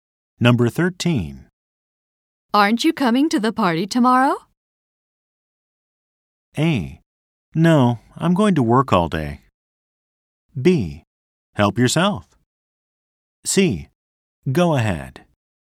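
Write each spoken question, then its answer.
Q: Aren't you coming to the party tomorrow?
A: A: No, I'm going to work all day.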